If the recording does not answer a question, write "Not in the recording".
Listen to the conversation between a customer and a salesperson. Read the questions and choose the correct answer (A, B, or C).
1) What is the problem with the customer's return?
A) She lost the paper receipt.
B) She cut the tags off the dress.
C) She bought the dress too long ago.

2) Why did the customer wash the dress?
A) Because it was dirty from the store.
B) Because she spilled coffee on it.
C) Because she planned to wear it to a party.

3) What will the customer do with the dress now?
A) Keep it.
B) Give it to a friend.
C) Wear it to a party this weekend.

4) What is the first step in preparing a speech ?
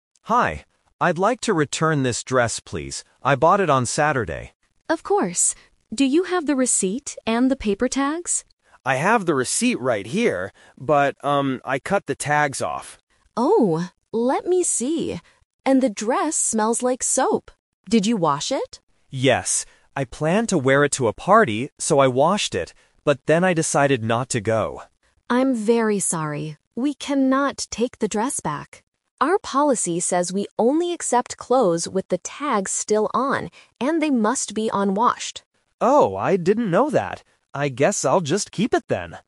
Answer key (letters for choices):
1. B
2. C
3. A
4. Not in the recording

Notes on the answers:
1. The customer explicitly says, "I cut the tags off."
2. The customer explains her reason clearly: "I planned to wear it to a party, so I washed it."
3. At the end of the conversation, the customer says, "I guess I'll just keep it then."

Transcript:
Customer: Hi. I'd like to return this dress, please. I bought it on Saturday.
Salesperson: Of course. Do you have the receipt and the paper tags?
Customer: I have the receipt right here. But, um, I cut the tags off.
Salesperson: Oh, let me see. And the dress smells like soap. Did you wash it?
Customer: Yes. I planned to wear it to a party, so I washed it. But then I decided not to go.
Salesperson: I'm very sorry. We cannot take the dress back. Our policy says we only accept clothes with the tags still on, and they must be unwashed.